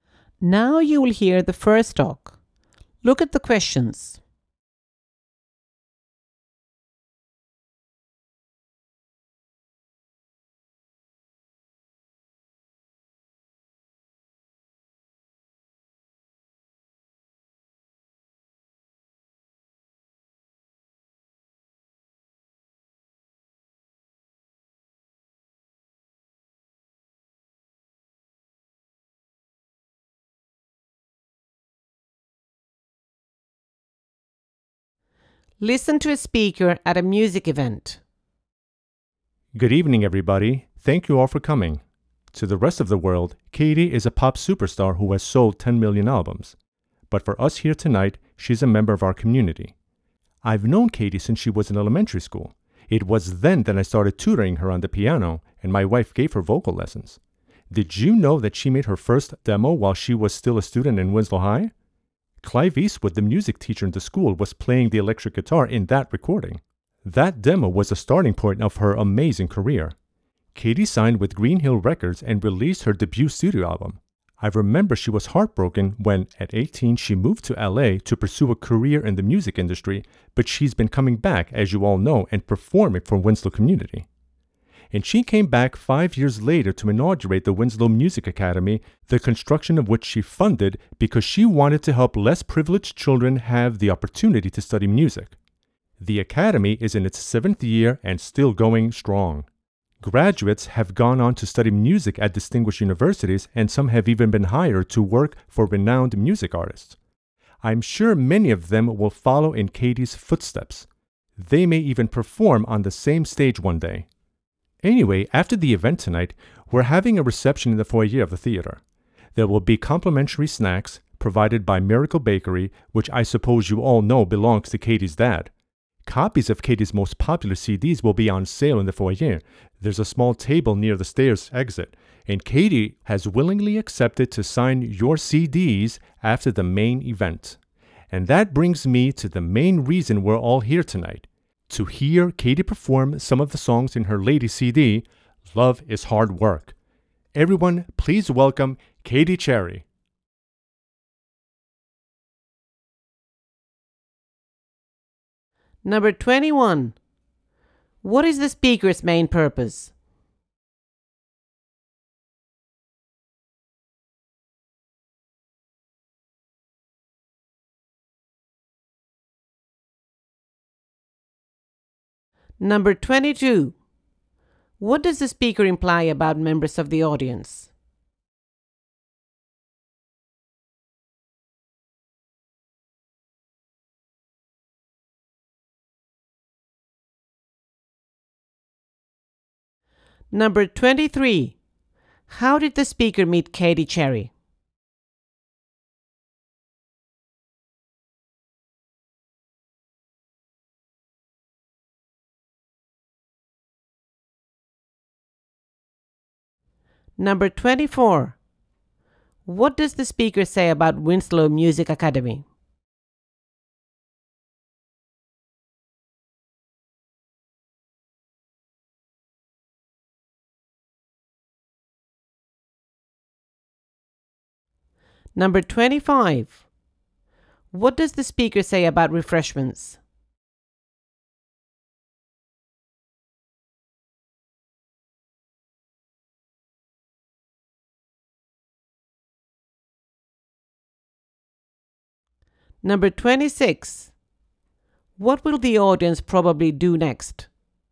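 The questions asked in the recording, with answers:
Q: What is the speaker's main purpose?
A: To introduce Katy Cherry before her performance

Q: How did the speaker meet Katy Cherry?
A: He tutored her on the piano when she was in elementary school

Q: What does the speaker say about Winslow Music Academy?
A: Katy funded it to help less privileged children study music

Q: What does the speaker say about refreshments?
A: Free snacks from Miracle Bakery, owned by Katy's dad, at the reception in the foyer

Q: What will the audience probably do next?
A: Listen to Katy perform songs from her latest CD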